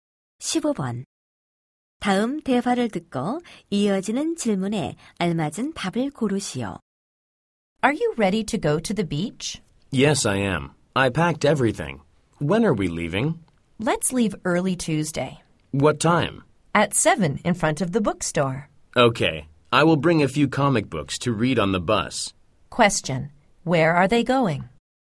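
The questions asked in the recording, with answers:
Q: Question. Where are they going?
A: To the beach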